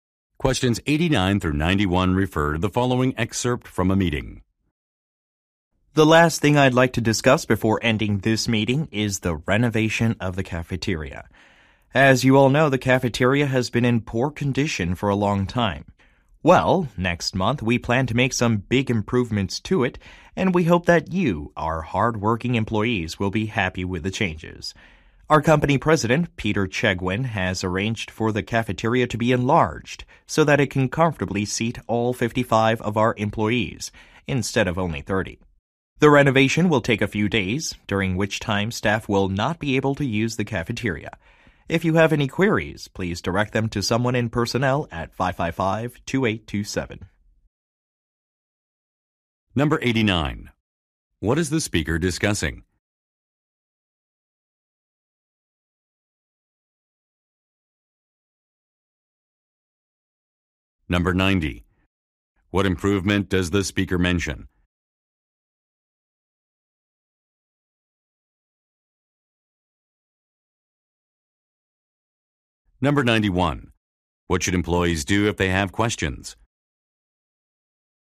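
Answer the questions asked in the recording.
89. The renovation of the cafeteria
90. The cafeteria will be enlarged to seat 55 people
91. Contact the personnel department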